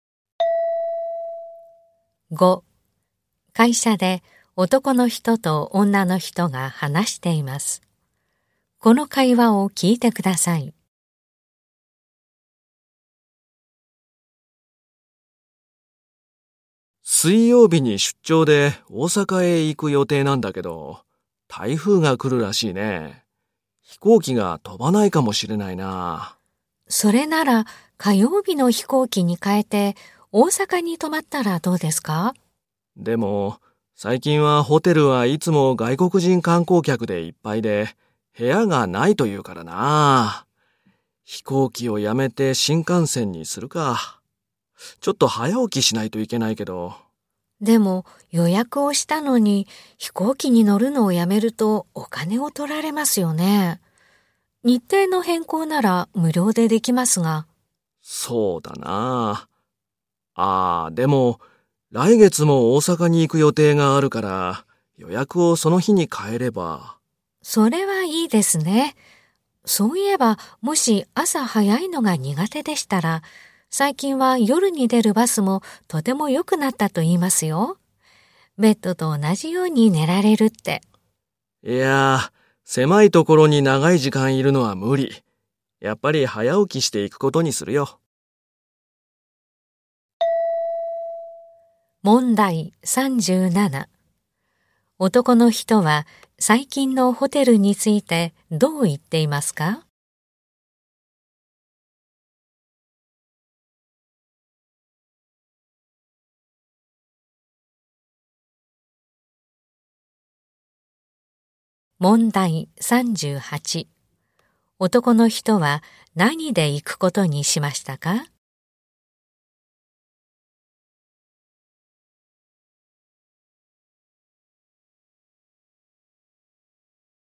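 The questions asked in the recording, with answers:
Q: 男の人は最近のホテルについてどう言っていますか?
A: 外国人観光客でいっぱいで部屋がない

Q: 男の人は何で行くことにしましたか?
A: 新幹線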